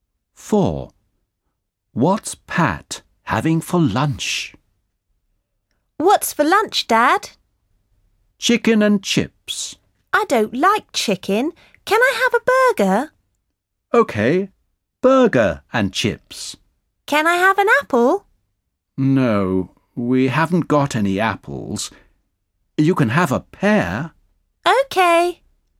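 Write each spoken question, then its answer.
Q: What's Pat having for lunch?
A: burger and chips and a pear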